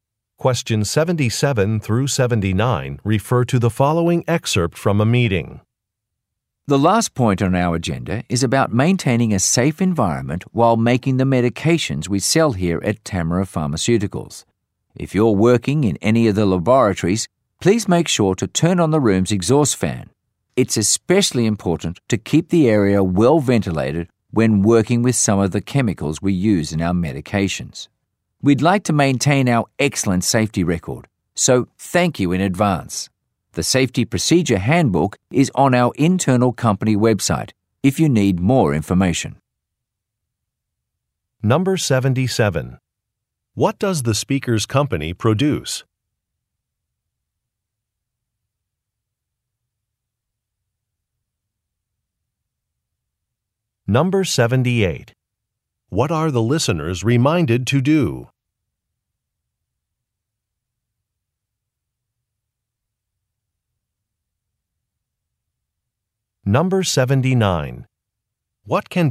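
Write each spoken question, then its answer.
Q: What does the speaker's company produce?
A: Medications

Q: What are the listeners reminded to do?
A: Turn on the room's exhaust fan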